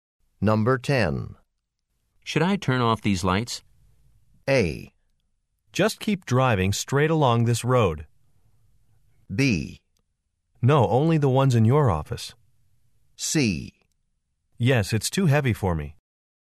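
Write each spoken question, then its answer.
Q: Should I turn off these lights?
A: B: No, only the ones in your office.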